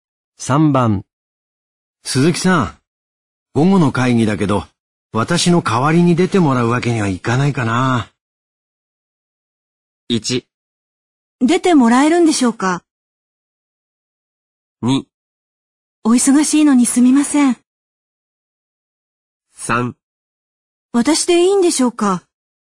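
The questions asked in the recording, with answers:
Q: 鈴木さん、午後の会議だけど、私の代わりに出てもらうわけにはいかないかな。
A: 3: 私でいいんでしょうか?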